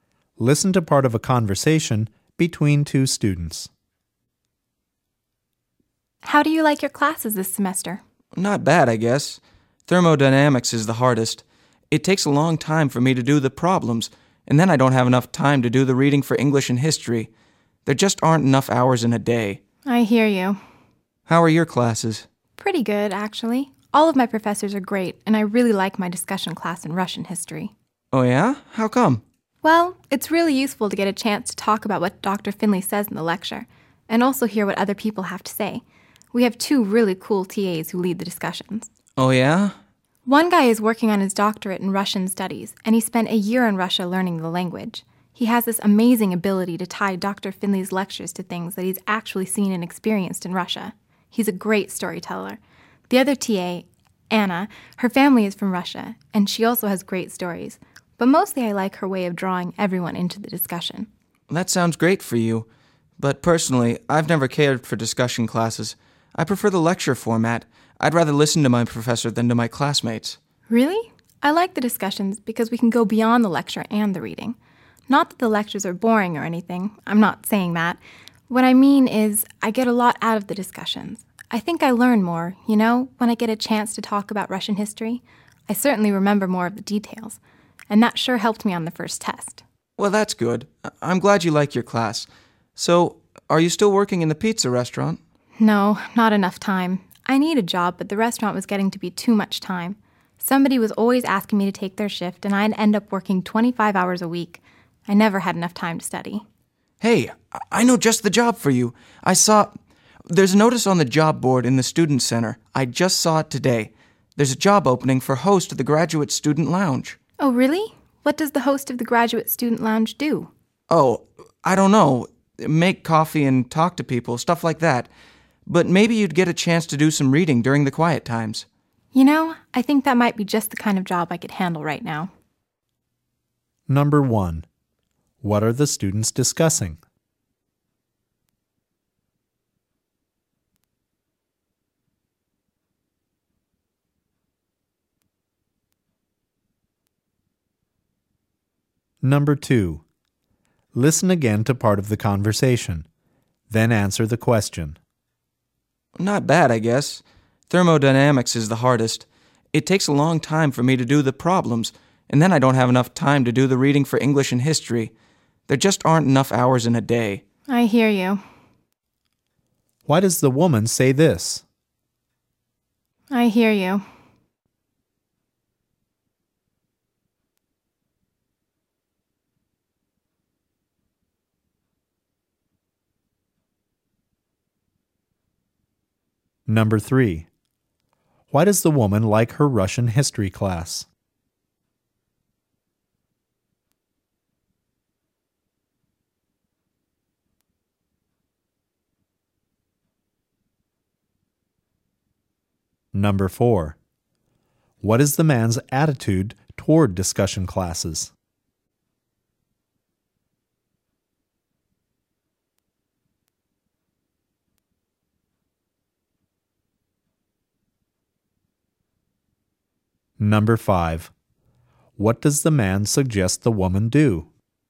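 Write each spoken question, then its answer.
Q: What are the students discussing?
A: Their classes and jobs

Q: Why does the woman like her Russian history class?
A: The discussions with the TAs help her learn and remember more

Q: What is the man's attitude toward discussion classes?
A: He doesn't like them; he prefers lectures

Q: What does the man suggest the woman do?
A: Apply for the job as host of the Graduate Student Lounge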